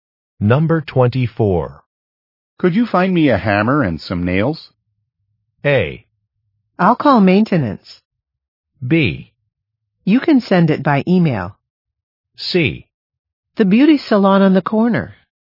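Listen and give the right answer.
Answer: A: I'll call maintenance.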